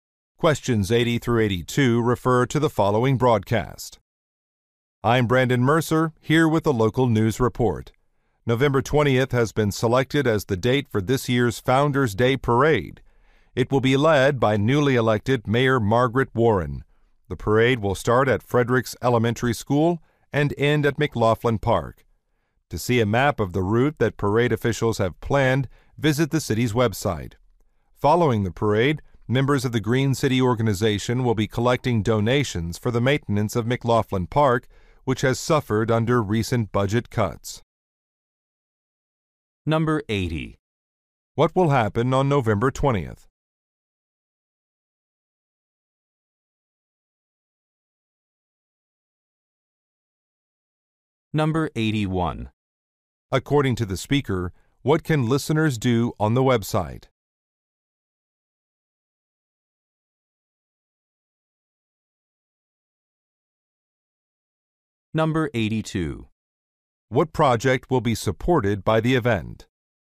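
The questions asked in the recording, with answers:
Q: What will happen on November 20th?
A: A parade (Founders Day Parade)

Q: According to the speaker, what can listeners do on the website?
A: See a map of the parade route

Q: What project will be supported by the event?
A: Maintenance of McLaughlin Park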